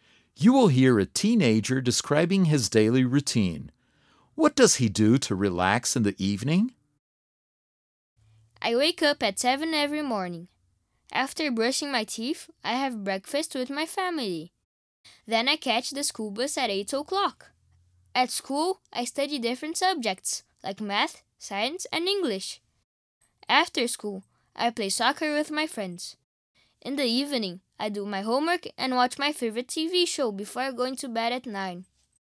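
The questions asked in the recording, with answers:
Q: What does he do to relax in the evening?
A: He watches his favorite TV show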